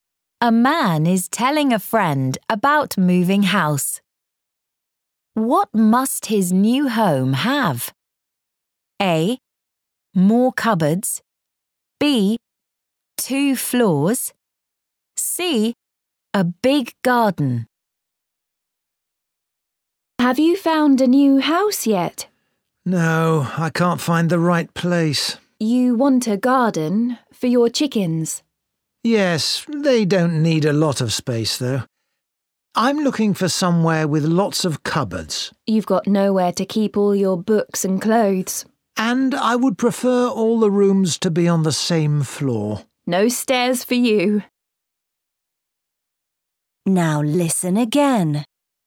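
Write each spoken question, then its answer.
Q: What must his new home have?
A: A: More cupboards.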